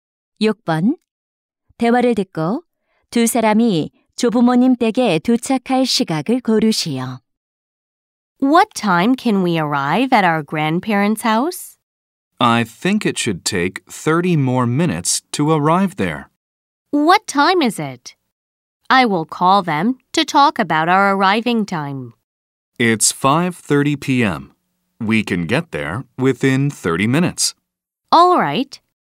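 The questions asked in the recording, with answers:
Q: 대화를 듣고 두 사람이 조부모님 댁에 도착할 시각을 고르시오.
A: 오후 6시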